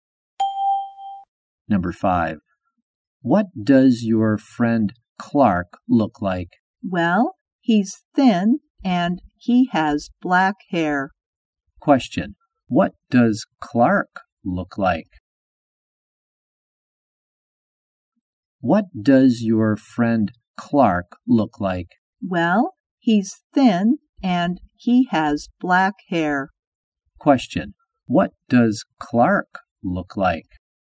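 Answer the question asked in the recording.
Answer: He's thin and has black hair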